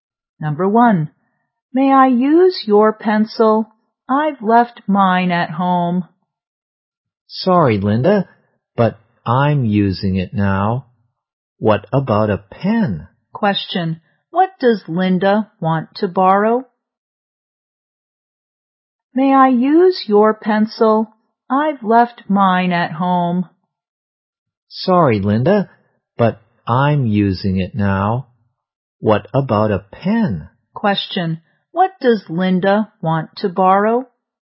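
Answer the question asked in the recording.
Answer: A pencil.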